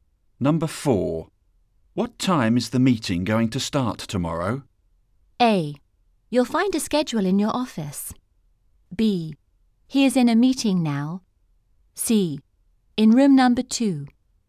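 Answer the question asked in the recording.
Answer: A: You'll find a schedule in your office.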